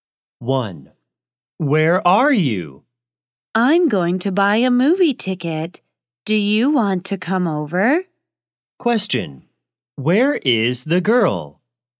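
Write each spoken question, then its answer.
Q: Where is the girl?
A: At the movie theater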